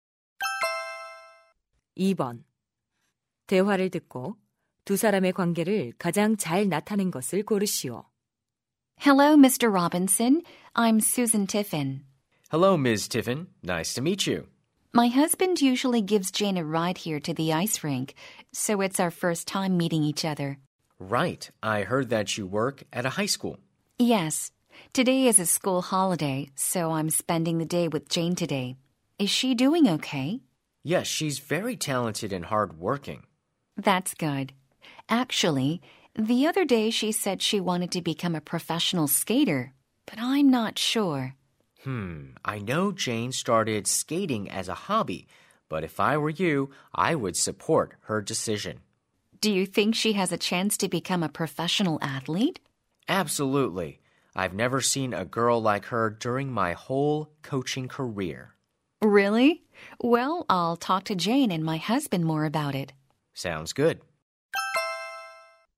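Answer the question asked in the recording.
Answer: 학부모 - 스케이트 코치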